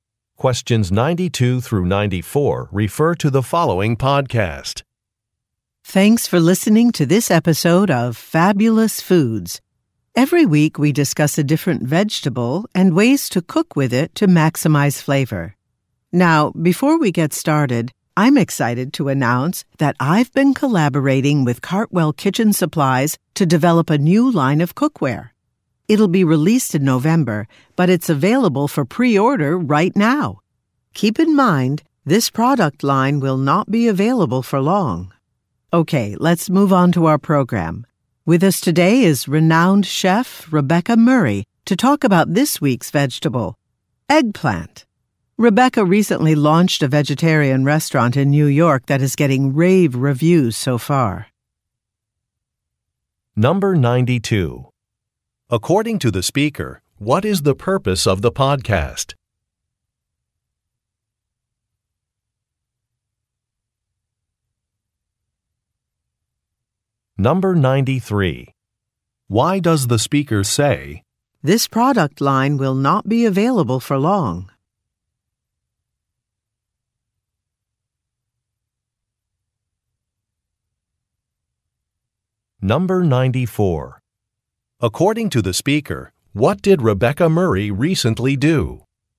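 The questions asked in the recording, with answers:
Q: According to the speaker, what is the purpose of the podcast?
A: To discuss ways to cook vegetables

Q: Why does the speaker say,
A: To encourage listeners to pre-order soon

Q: According to the speaker, what did Rebecca Murray recently do?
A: Opened a vegetarian restaurant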